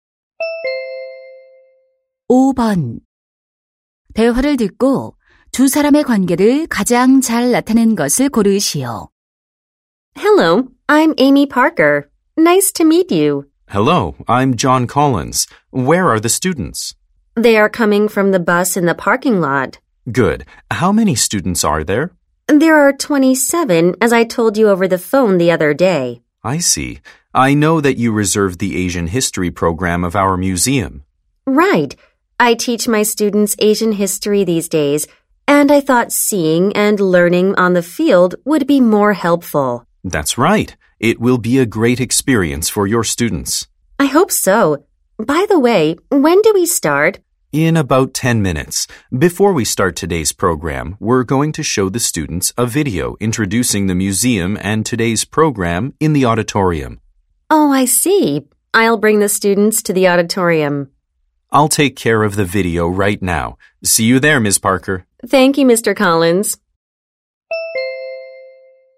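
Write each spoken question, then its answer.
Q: 대화를 듣고 두 사람의 관계를 가장 잘 나타낸 것을 고르시오.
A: 교사 - 박물관 직원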